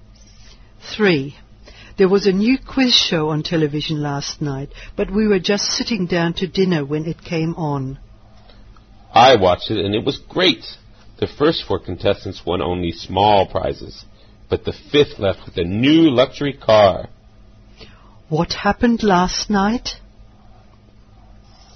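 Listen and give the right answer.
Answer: A new quiz show was on TV and the fifth contestant won a luxury car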